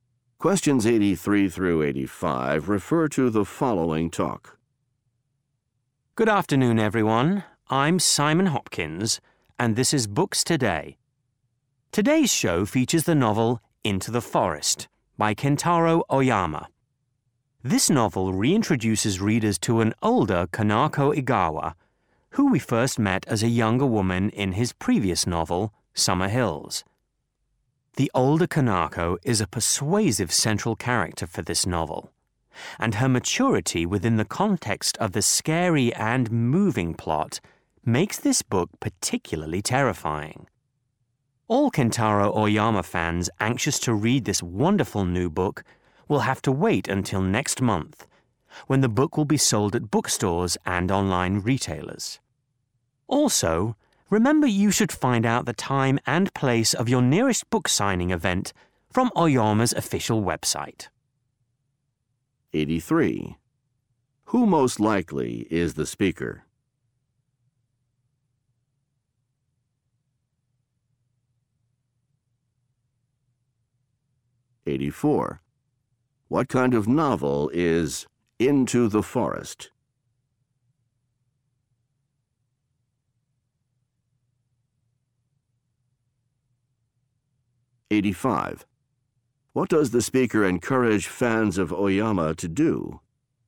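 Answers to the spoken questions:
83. A radio show host
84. A scary, terrifying novel
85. Check his official website for book signing events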